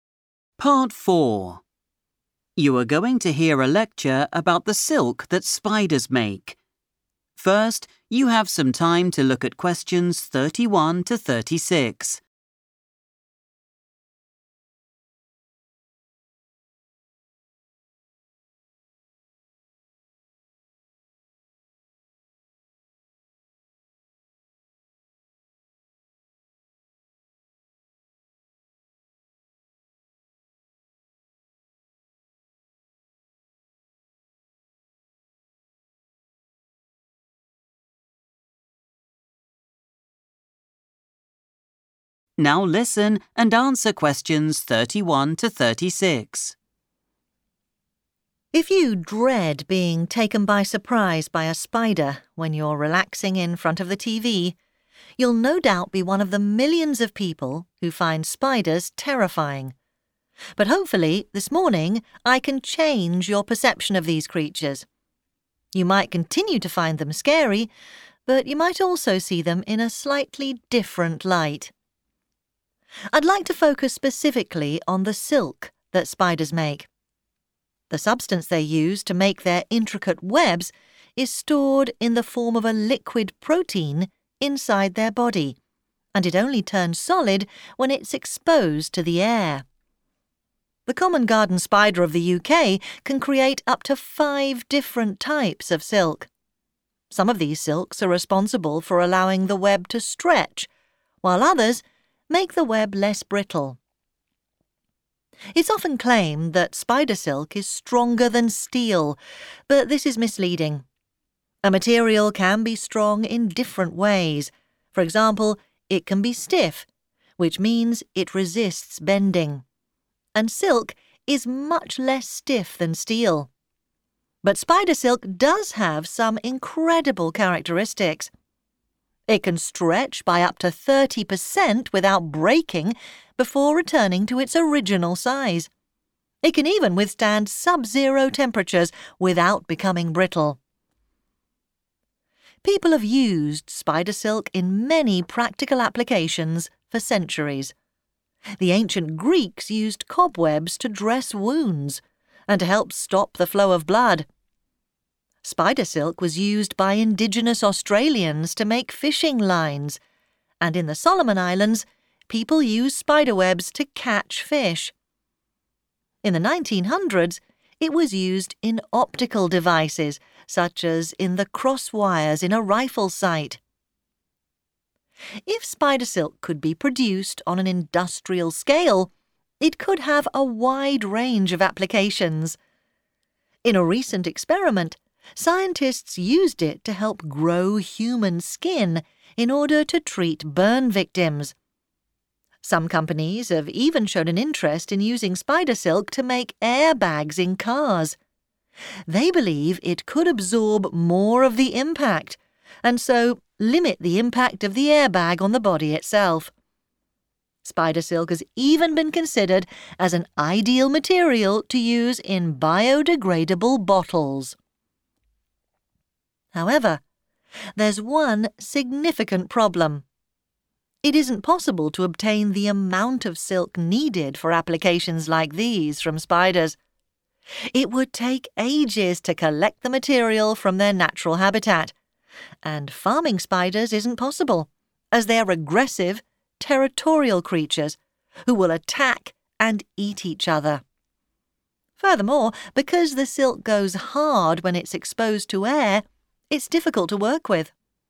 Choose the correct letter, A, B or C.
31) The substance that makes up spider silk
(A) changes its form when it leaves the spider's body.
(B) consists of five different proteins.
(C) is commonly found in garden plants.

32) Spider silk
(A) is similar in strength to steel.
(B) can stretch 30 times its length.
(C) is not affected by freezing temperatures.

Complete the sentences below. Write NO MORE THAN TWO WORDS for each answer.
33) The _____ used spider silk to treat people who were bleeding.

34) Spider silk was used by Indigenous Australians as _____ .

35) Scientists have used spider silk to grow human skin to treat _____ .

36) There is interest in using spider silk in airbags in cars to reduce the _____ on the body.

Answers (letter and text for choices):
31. (A) changes its form when it leaves the spider's body.
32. (C) is not affected by freezing temperatures.
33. ancient Greeks
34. fishing lines
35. burn victims
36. impact

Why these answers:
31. The correct answer is supported by the speaker's description of the silk production process. Inside the spider, the silk is kept as a 'liquid protein.' When the spider releases it and the substance touches the air, it 'turns solid.' This transition from a liquid state to a solid state is a change in its physical form.
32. The correct answer is C because the lecturer explains that spider silk can handle very cold weather. The talk mentions that spider silk does not become 'brittle' (hard and easy to break) when the temperature is below zero degrees. Choice A is wrong because the lecturer says the comparison to steel is 'misleading'. Choice B is wrong because the silk stretches by 30 percent, not 30 times its length. Identifying 'sub-zero' as a synonym for 'freezing' is key.
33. The correct answer is "ancient Greeks" because the lecturer describes how they used spider webs (referred to as 'cobwebs') for medical purposes. The transcript mentions they used these webs to "stop the flow of blood," which is a synonym for treating people who are "bleeding."
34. The correct answer is based on the part of the talk where the lecturer describes historical uses of spider silk. The transcript explicitly mentions that native people in Australia, known as Indigenous Australians, used this silk to create fishing lines. Keywords like 'Indigenous Australians' and 'make' connect directly to the question about how they used the silk.
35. The correct answer is "burn victims" because the transcript describes a recent scientific experiment where spider silk was used as a tool to help grow human skin. This process was done specifically to provide medical treatment for people who have suffered skin damage from burns. The keywords are "scientists used it," "grow human skin," and "treat."
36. The correct answer is 'impact' because the transcript explains that businesses are interested in using spider silk for car airbags. It specifically states that using silk could help 'limit the impact' of the airbag on a person's body. In this context, 'limit' means the same thing as 'reduce', making 'impact' the correct word to complete the sentence.

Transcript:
Lecturer: If you dread being taken by surprise by a spider when you're relaxing in front of the TV, you'll no doubt be one of the millions of people who find spiders terrifying. But hopefully, this morning I can change your perception of these creatures. You might continue to find them scary but you might also see them in a slightly different light.
I'd like to focus specifically on the silk that spiders make. The substance they use to make their intricate webs is stored in the form of a liquid protein inside their body and it only turns solid when it's exposed to the air. The common garden spider of the UK can create up to five different types of silk. Some of these silks are responsible for allowing the web to stretch while others make the web less brittle.
It's often claimed that spider silk is stronger than steel but this is misleading. A material can be strong in different ways: for example, it can be stiff, which means it resists bending, and silk is much less stiff than steel. But spider silk does have some incredible characteristics. It can stretch by up to 30 per cent without breaking before returning to its original size. It can even withstand sub-zero temperatures without becoming brittle.
People have used spider silk in many practical applications for centuries. The ancient Greeks used cobwebs to dress wounds and to help stop the flow of blood. Spider silk was used by Indigenous Australians to make fishing lines, and in the Solomon Islands people use spider webs to catch fish. In the 1900s it was used in optical devices, such as in the crosswires in a rifle sight.
If spider silk could be produced on an industrial scale, it could have a wide range of applications. In a recent experiment, scientists used it to help grow human skin in order to treat burn victims. Some companies have even shown an interest in using spider silk to make airbags in cars. They believe it could absorb more of the impact and so limit the impact of the airbag on the body itself. Spider silk has even been considered as an ideal material to use in biodegradable bottles.
However, there's one significant problem. It isn't possible to obtain the amount of silk needed for applications like these from spiders. It would take ages to collect the material from their natural habitat, and farming spiders isn't possible as they are aggressive, territorial creatures who will attack and eat each other. Furthermore, because the silk goes hard when it's exposed to air, it's difficult to work with.